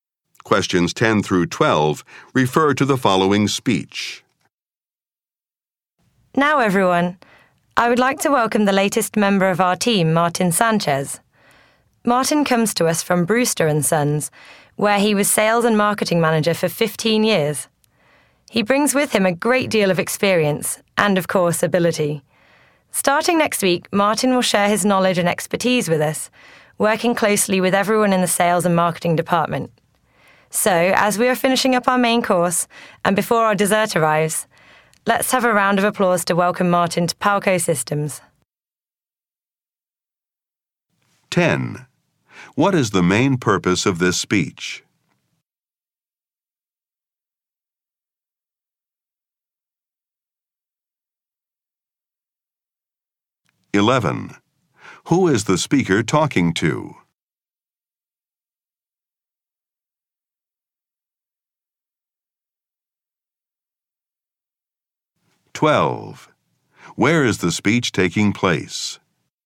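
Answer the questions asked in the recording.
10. To welcome a new team member, Martin Sanchez
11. Employees of Palco Systems
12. At a dinner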